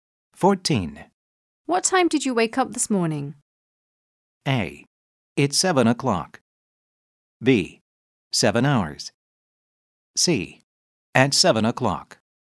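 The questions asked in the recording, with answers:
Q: What time did you wake up this morning?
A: C: At 7 o'clock.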